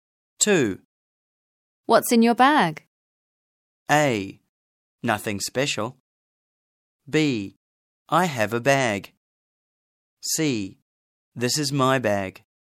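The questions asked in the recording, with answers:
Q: What's in your bag?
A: A: Nothing special.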